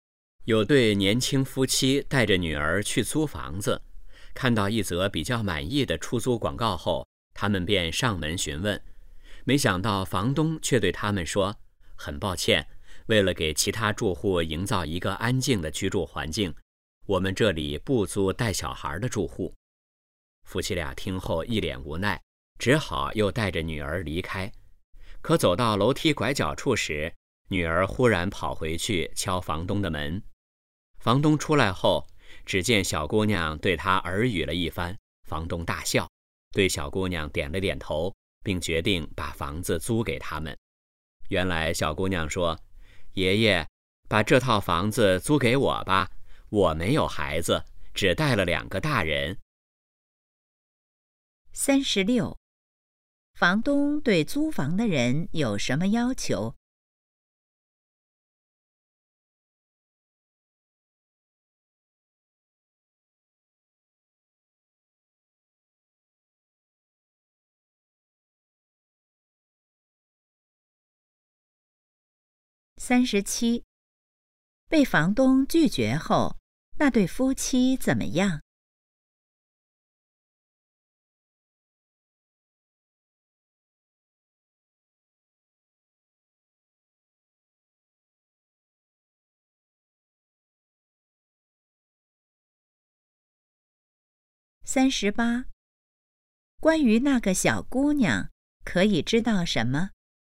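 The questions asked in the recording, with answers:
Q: 房东对租房的人有什么要求?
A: 不能带小孩

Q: 被房东拒绝后,那对夫妻怎么样?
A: 很无奈,只好离开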